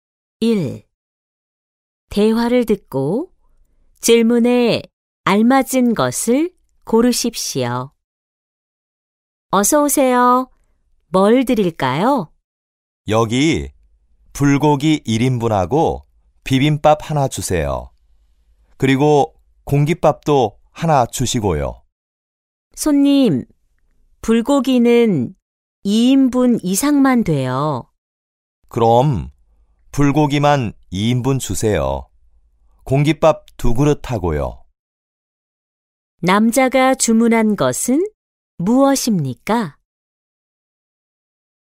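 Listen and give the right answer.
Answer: 불고기 2인분과 공깃밥 두 그릇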